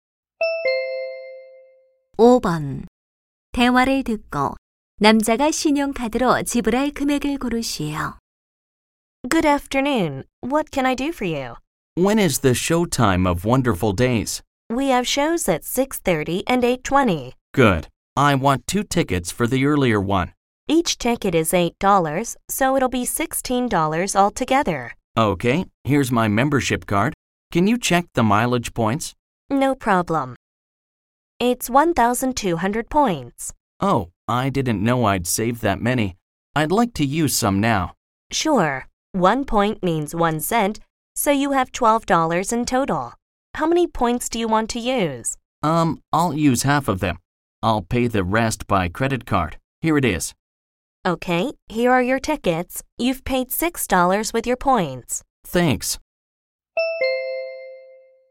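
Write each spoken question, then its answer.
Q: 대화를 듣고 남자가 신용카드로 지불할 금액을 고르시오.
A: 10달러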